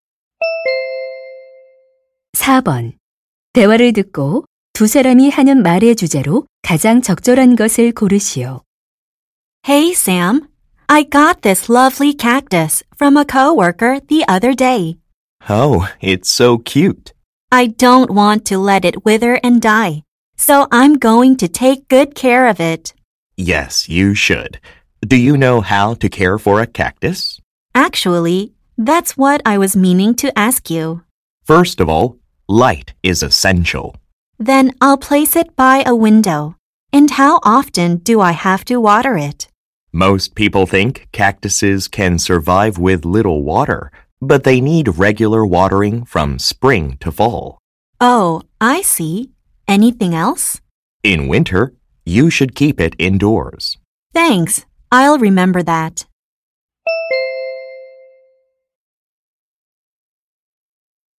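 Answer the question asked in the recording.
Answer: 선인장 키우는 방법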